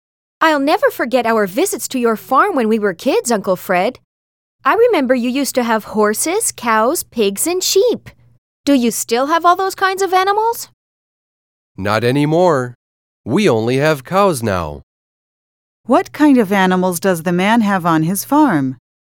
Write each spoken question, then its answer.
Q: What kind of animals does the man have on his farm?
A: But now he only has cows.